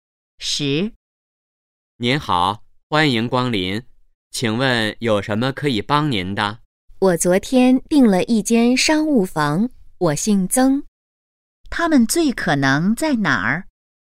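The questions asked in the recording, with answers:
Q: 他们最可能在哪儿?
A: 酒店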